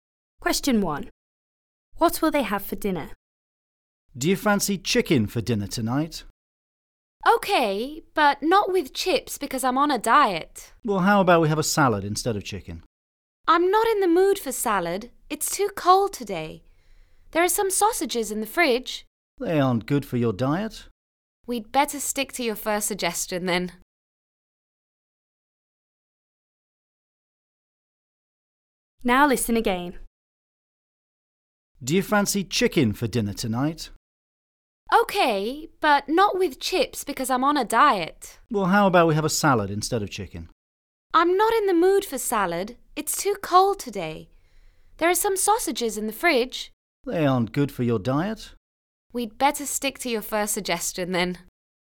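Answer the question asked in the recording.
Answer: Chicken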